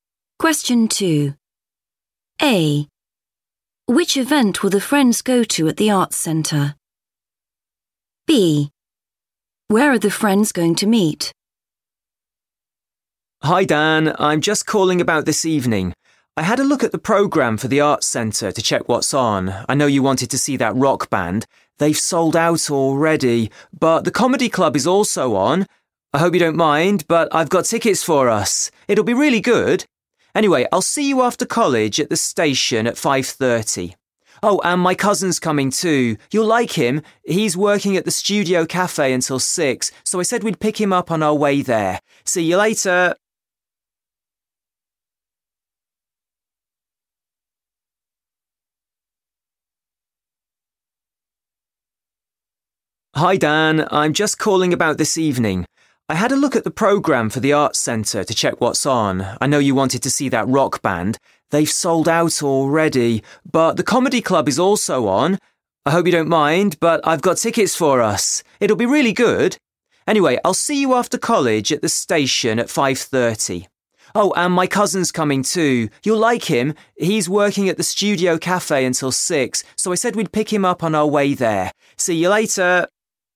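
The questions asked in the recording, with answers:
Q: Which event will the friends go to at the Arts Centre?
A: the comedy club

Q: Where are the friends going to meet?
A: at the station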